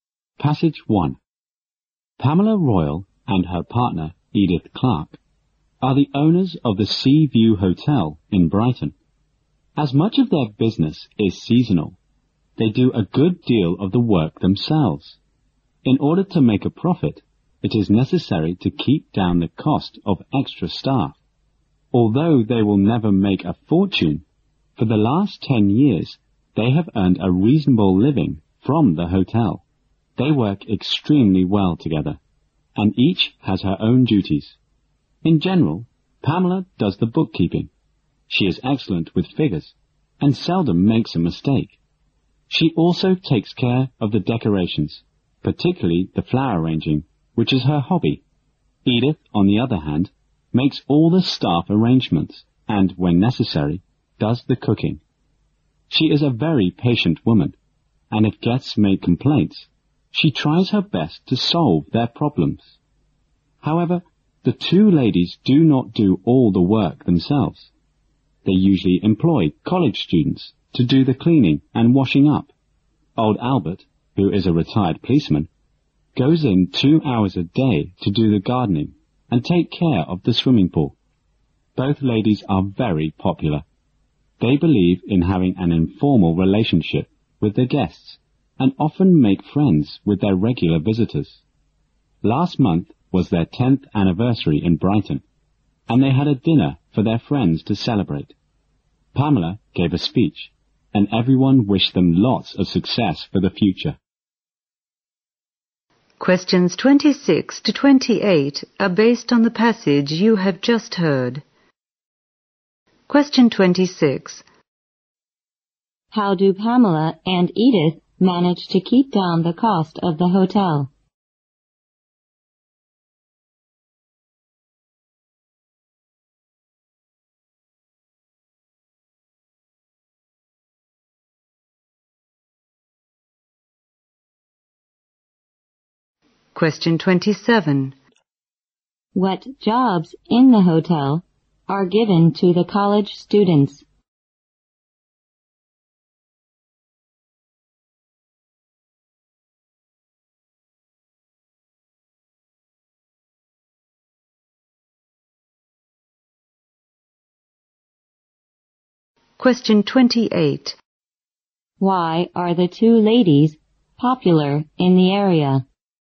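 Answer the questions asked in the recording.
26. They do a lot of the work themselves
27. Cleaning and washing up
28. They have an informal relationship with guests and make friends with regular visitors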